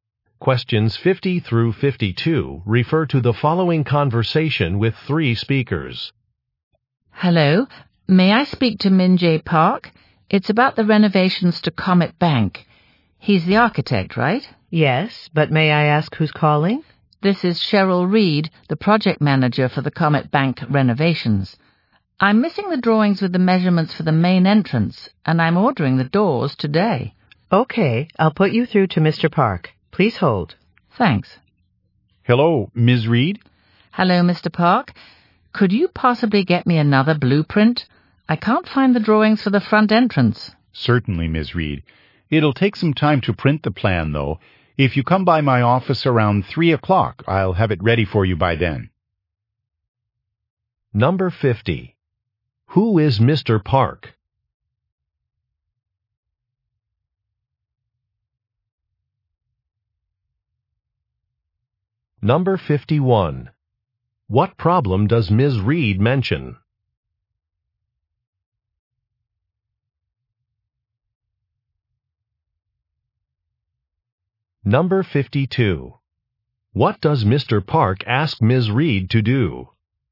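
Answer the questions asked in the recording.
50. An architect
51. She is missing the drawings for the main entrance
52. Come by his office around 3 o'clock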